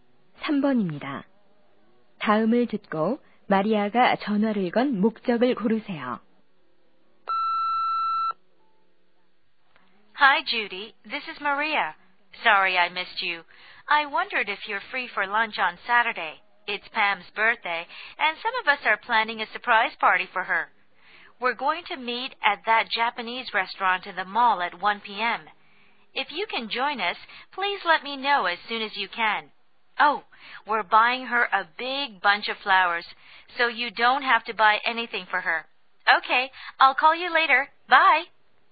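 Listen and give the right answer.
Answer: 토요일 팸의 깜짝 생일 파티 점심에 초대하려고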